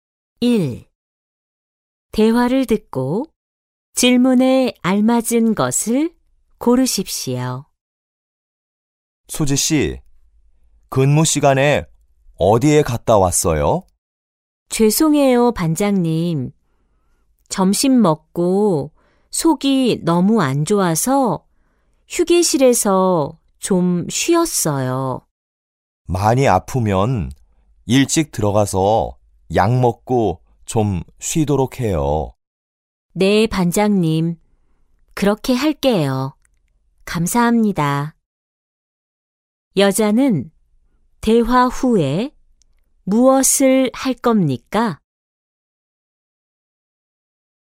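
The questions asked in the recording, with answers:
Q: 여자는 대화 후에 무엇을 할 겁니까?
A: 일찍 들어가서 약 먹고 쉴 겁니다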